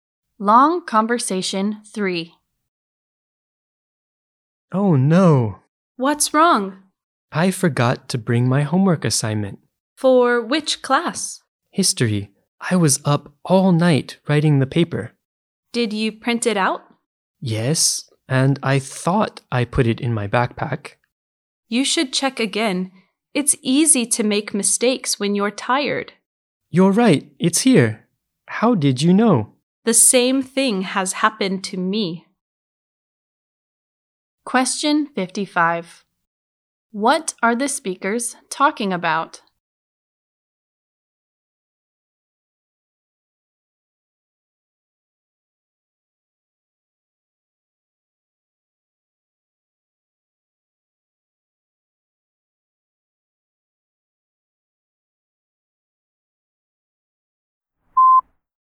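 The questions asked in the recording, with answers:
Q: What are the speakers talking about?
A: A history homework assignment (paper) one speaker thought they forgot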